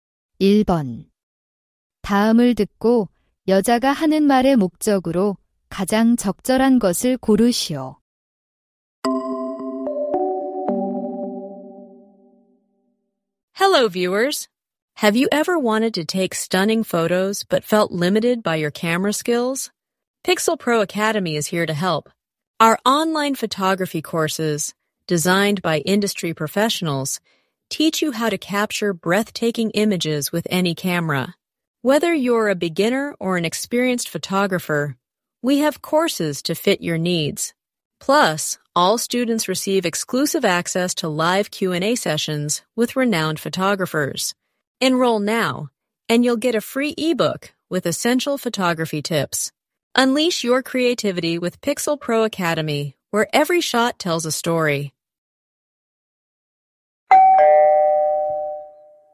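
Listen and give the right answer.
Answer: 온라인 사진 강좌를 홍보하려고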